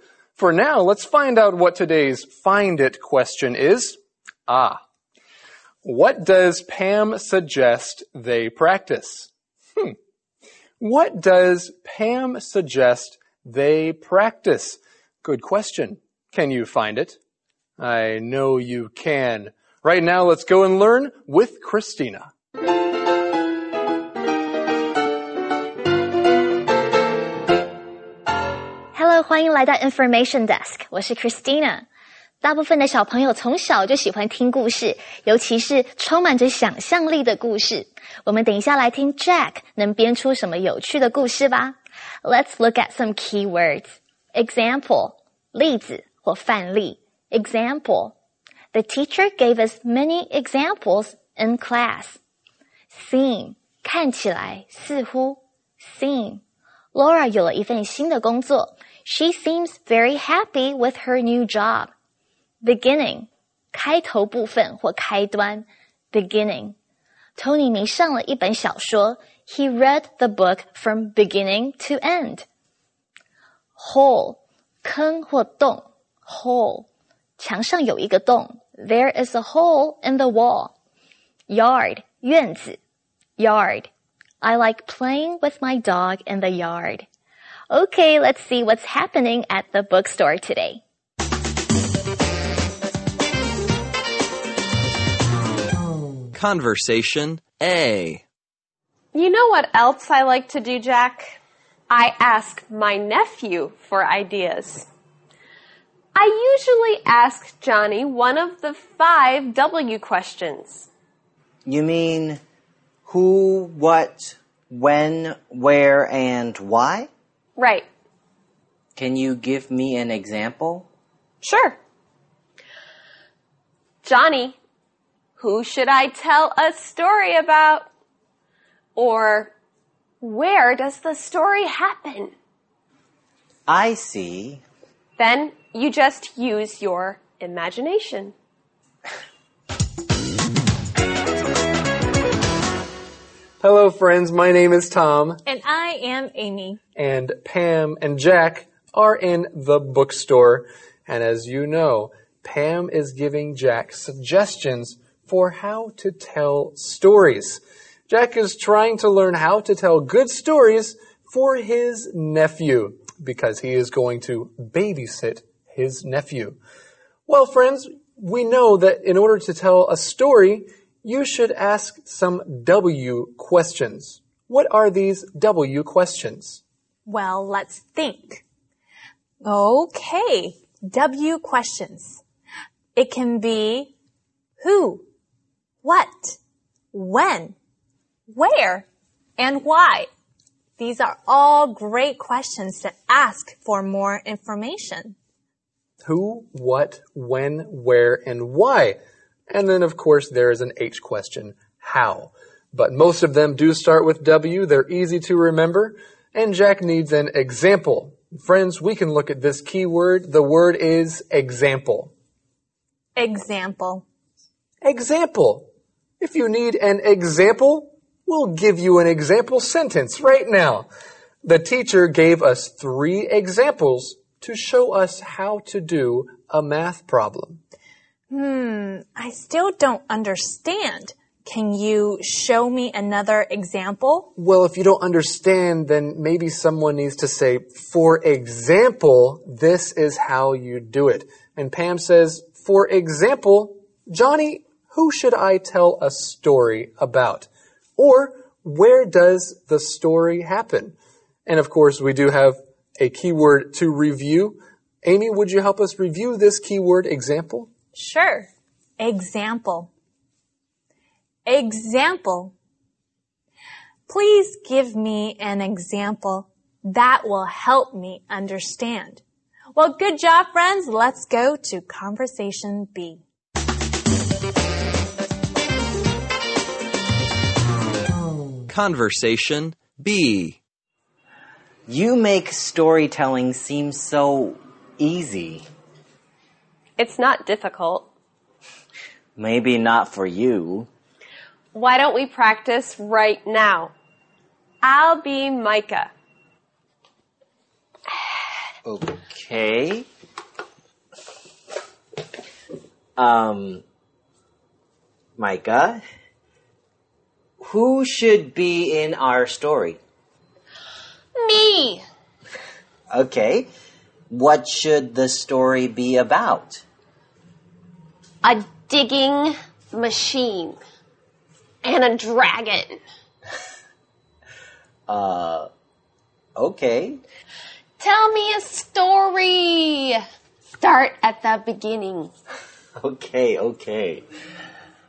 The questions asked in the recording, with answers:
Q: What does Pam suggest they practice?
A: Well, Pam suggests they practice storytelling.